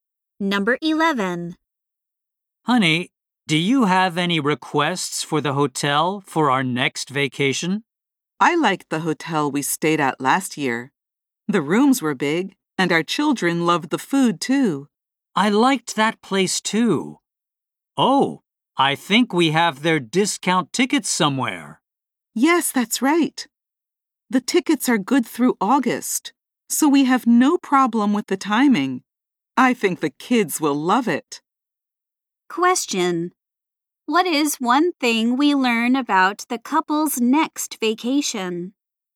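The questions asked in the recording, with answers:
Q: What is one thing we learn about the couple's next vacation?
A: They will stay at the same hotel as last year using discount tickets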